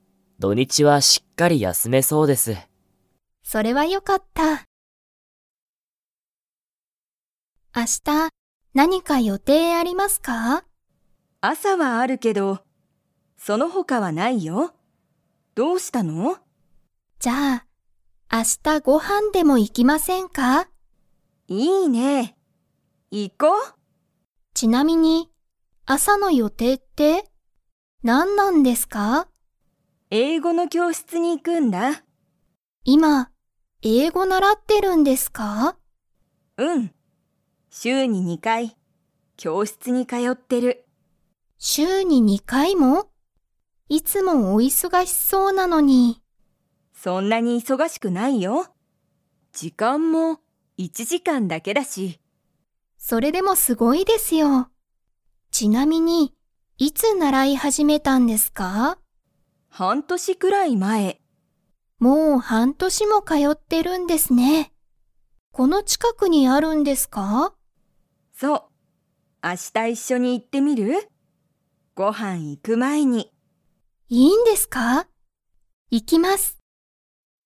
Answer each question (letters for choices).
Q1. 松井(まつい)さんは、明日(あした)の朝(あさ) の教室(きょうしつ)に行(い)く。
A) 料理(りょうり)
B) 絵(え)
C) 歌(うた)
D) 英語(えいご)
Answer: D

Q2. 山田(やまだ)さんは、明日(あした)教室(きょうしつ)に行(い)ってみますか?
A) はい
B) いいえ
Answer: A

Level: Level 4